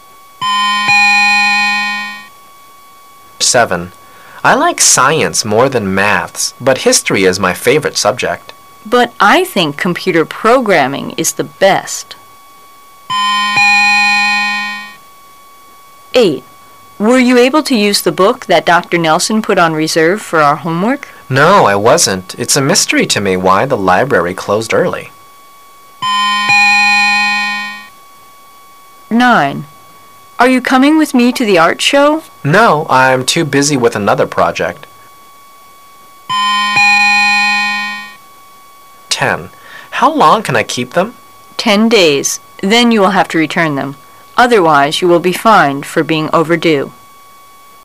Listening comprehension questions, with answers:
Part A You will hear 10 short dialogues. For each dialogue, there is one question and four possible answers. Choose the correct answer --A,B,C or D, and mark it in your test booklet. You will have 15 seconds to answer the question and you will hear each dialogue ONLY ONCE.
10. Where does this conversation most probably take place?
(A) In a library.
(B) In a hospital.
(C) At a bank.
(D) In a store.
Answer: In a library.

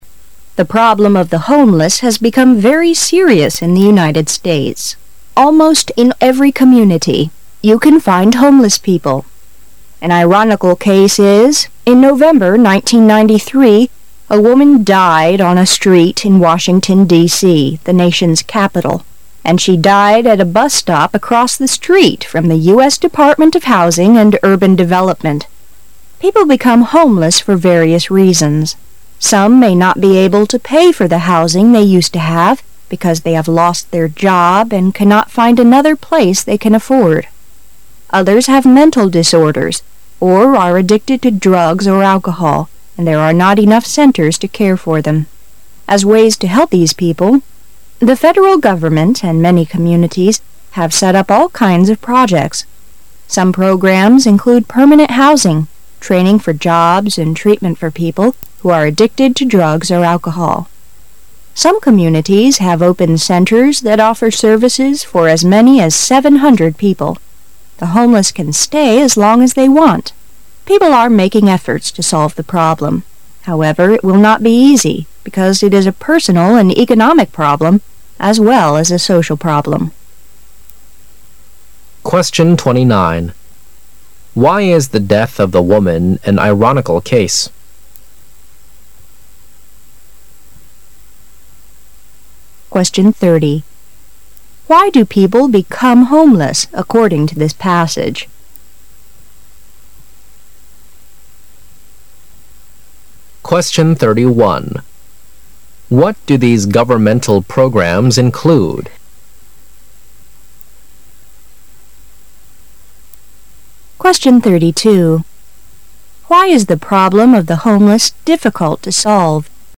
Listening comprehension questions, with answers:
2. Why do people become homeless according to this passage?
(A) Because they do not want to pay for the houses.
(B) Because they have financial troubles.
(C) Because they like traveling across the country.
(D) Because they like drinking out.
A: Because they have financial troubles.

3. What do these governmental programs include.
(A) Finding houses; training for jobs; medical treatment.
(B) Treatment for those who use drugs or 'alcohol; finding places to live; training for jobs.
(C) Finding them jobs; sending them to hospitals; looking for houses.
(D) Building houses for homeless people; teaching them English; finding doctors for them.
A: Treatment for those who use drugs or 'alcohol; finding places to live; training for jobs.

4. Why is the problem of the homeless difficult to solve?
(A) Because it is a personal and economic problem as well as a social one.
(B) Because it is a totally personal problem.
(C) Because it is a huge burden on economics.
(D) Because it is social problem.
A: Because it is a personal and economic problem as well as a social one.

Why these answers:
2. 事实细节题。文中分析了人们流离失所的原因,其中包括:" unable to pay for the housing they used to have","mental disorders"," addicted to drugs or alcohol"," there are not enough centre",只有选项B)与上述内容相符。
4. 事实细节题。文中在最后指出:" it will not be easy,because it is a personal and economic problem as well as social problem.",许多人无家可归这一问题不仅足个人问题,更是经济问题与社会问题,比较复杂。选项A)表达的正是此意。

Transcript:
A
[解析] 29-32 The problem of the homeless has become very serious in the United States. Almost in every community, you can find homeless people. An ironical case is: in November, 1993, a woman died on a street in Washington, D. , the nation's capital, and she died at a bus-stop across the street from the US Department of Housing and Urban Development. People become homeless for various reasons. Some may not be able to pay for the housing they used to have, because they have lost their job and cannot find another place they can afford. Others have mental disorders, or are addicted to drugs or alcohol, and there are not enough centres to care for them. As ways to help these people, the federal government and many communities have set up all kinds of projects. .Some programs include permanent housing, training for jobs and treatment for people who are addicted to drugs or alcohol. Some communities have opened centres that offer services for as many as 700 people. The homeless can stay as long as they want. People are making efforts to solve the problem. However, it will not be easy, because it is a personal and economic problem as well as a social problem. Why is the death of the woman an ironical case?

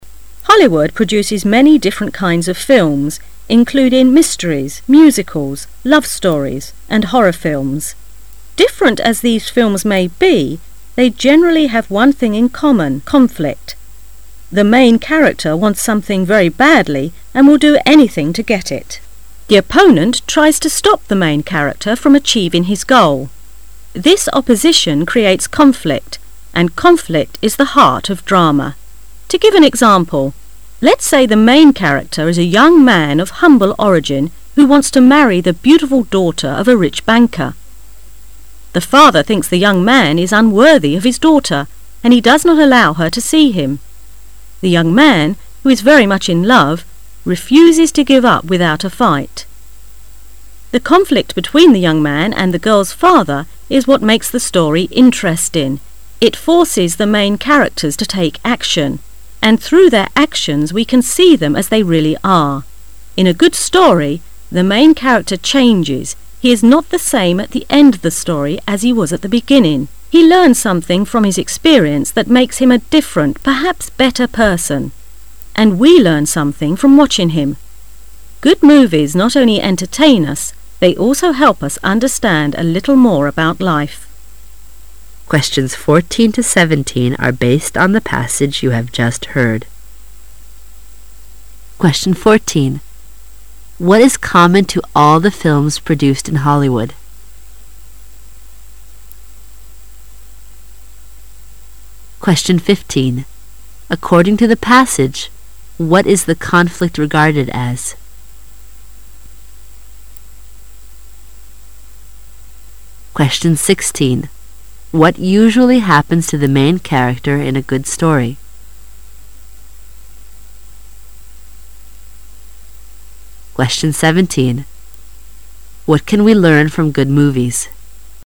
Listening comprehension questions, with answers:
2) According to the passage, what is the "conflict" regarded as?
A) A part of drama.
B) The heart of drama.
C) Unnecessary.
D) Easy to describe.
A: The heart of drama.

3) What usually happens to the main character in a good story?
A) The main character remains the same.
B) The main character dies in the end.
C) The main character gains his aim.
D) The main character undergoes a change.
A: The main character undergoes a change.

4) What can we learn from good movies?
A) We can learn how can people improve themselves.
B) We can experience the same feeling of characters.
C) We can understand life a little better.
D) We can find better ways to cope with conflicts.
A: We can understand life a little better.

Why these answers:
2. 题目问的是:文中的"矛盾"被视作什么? 文章第五句提到:and conflict is the heart of drama"矛盾冲突是剧的核心"。由此可知[B]"剧的核心"是正确的。
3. 题目问的是:在一个好的剧情中通常主要人物都会发生什么事? 文章倒数第三句提到:In a good story,the main character changes"在一个好的剧情里,主要人物改变厂",由此可知[D]"主要人物经历了改变"是正确的。
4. 题目问的是:我们能从好电影中学到什么? 文章最后一句提到:Good movies not only entertain us,they also help us understand a little more about life"好电影不仅仅可以让我们娱乐,他们也帮助我们更深地理解生活"。由此可知[C]"我们可以更好的理解生活"是正确的。

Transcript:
[解析] 14-17 Hollywood produces many different kinds of films, including mysteries, musicals, love stories, and horror films. Different as these films may be, they generally have one thing in common conflict. The main character wants something very badly and will do anything to get it. The opponent tries to stop the main character from achieving his goal. This opposition creates conflict, and conflict is the heart of drama. To give an example, let's say the main character is a young man of humble origin who wants to marry the beautiful daughter of a rich banker. The father thinks the young man is unworthy of his daughter, and he does not allow her to see him. The young man, who is very much in love, refuses to give up without a fight. The conflict between the young man and the girl's father is what makes the story interesting: it forces the main character to take action, and through their actions we can see them as they really are. In a good story, the main character changes he is not the same at the end of the story as he was at the beginning. He learns something from his experience that makes him a different, perhaps better person. And we learn something from watching him. Good movies not only entertain us, they also help us understand a little more about life. 14.What is common to all the films produced in Hollywood?

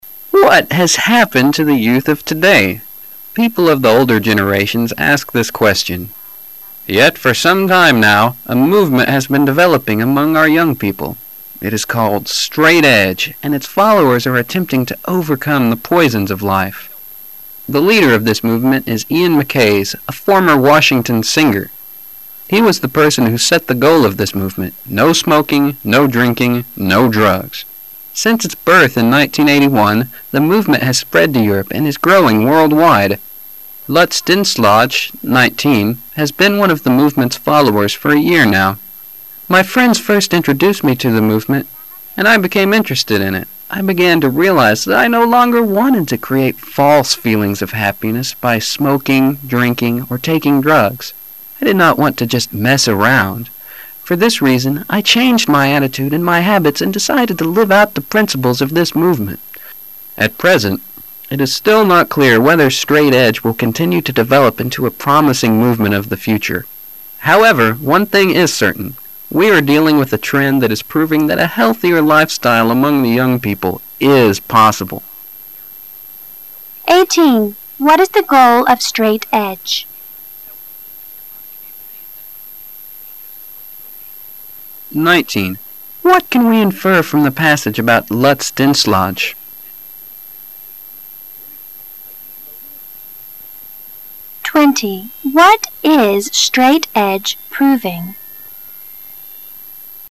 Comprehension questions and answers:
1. What can we infer from the passage about Lutz Dinslage?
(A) He used to drink, smoke and take drugs.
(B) He belonged to a street gang.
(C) He was jobless when he joined the movement.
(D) He was a close friend of the movement's leader.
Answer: He used to drink, smoke and take drugs.

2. What is Straight Edge proving?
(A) It is brad for the older generation to understand the young.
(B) It is possible for young people to live a healthier life.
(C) A life style free from the poisons of life is worth striving for.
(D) Young people will live a healthier life if left to make their own choices.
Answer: It is possible for young people to live a healthier life.

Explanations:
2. 细节判断题 [详细解答] 根据材料最后一句:However,one thing is certain:we are dealing with a trend that is proving that a healthier life style among the young people is possible.可知本题正确答案为B项。

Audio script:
[解析] 18-20 What has happened to the youth of today? People of the older generations ask this question. Yet, for some time now a movement has been developing among our young people. It is called "Straight Edge" and its followers are attempting to overcome the poisons of life. The leader of this movement is Ian Mckays, a former Washington singer. He was the person who set the goal of this movement: no smoking, no drinking, no drugs. Since its birth in 1981, the movement has spread to Europe and is growing worldwide. Lutz Dinslage, 19, has been one of the movement's followers for a year now. "My friends first introduced me to the movement, and I became interested in it. I began to realize that I no longer wanted to create false feelings of happiness by smoking, drinking or taking drags. I did not want to just mess around. For this reason I changed my attitude and my habits and decided to live out the principles of this movement." At present it is still not clear whether Straight Edge will continue to develop into a promising movement of the future. However, one thing is certain: we are dealing with a trend that is proving that a healthier life style among the young people is possible. What is the goal of Straight Edge?

